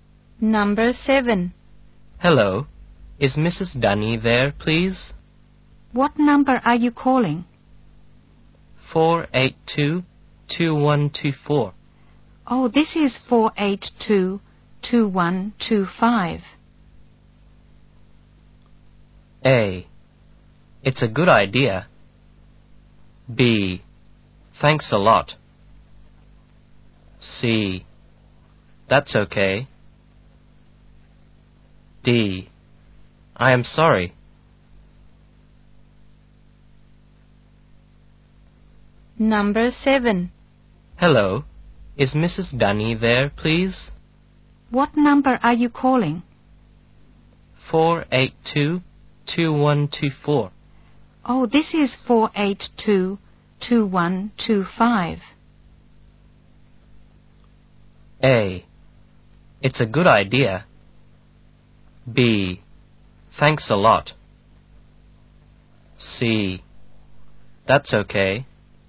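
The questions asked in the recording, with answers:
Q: "Oh, this is 482-2125.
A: D: I am sorry.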